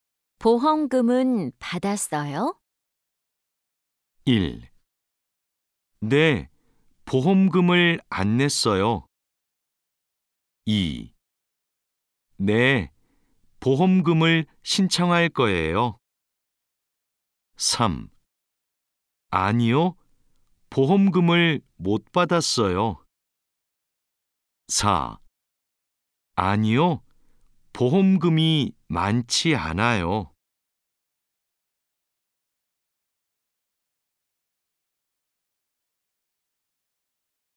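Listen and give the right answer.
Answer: 3: 아니요, 보험금을 못 받았어요.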